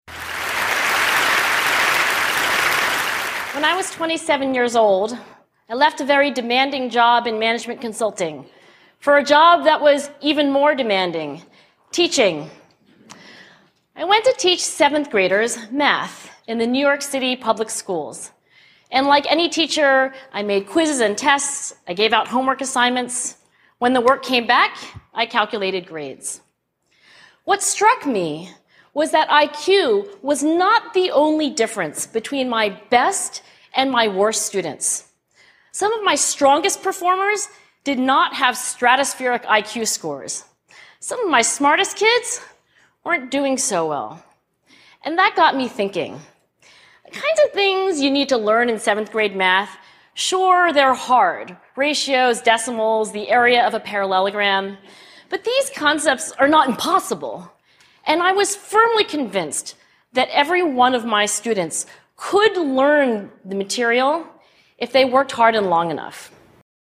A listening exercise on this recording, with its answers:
音声を聞いて空欄を埋めましょう。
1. When I was 27 years old, I left a very 1__________ __________ in management consulting for a job that was even more demanding:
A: demanding job

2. for a job that was even more demanding: 2__________.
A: teaching

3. I went to teach seventh graders math in the New York City 3__________ __________.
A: public schools

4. I gave out 4__________ __________.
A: homework assignments

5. What 5__________ __________ was that IQ was not the only difference between my best and my worst students.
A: struck me

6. Some of my 6__________ __________ did not have stratospheric IQ scores.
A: strongest performers

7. And that 7__________ __________ __________.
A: got me thinking

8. they're hard: 8__________, decimals, the area of a parallelogram.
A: ratios

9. and I was 9__________ __________ that every one of my students could learn the material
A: firmly convinced

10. if they worked hard and 10__________ __________.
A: long enough

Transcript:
What struck me was that IQ was not the only difference between my best and my worst students. Some of my strongest performers did not have stratospheric IQ scores. Some of my smartest kids weren't doing so well. And that got me thinking. The kinds of things you need to learn in seventh-grade math, sure, they're hard: ratios, decimals, the area of a parallelogram. But these concepts are not impossible, and I was firmly convinced that every one of my students could learn the material if they worked hard and long enough.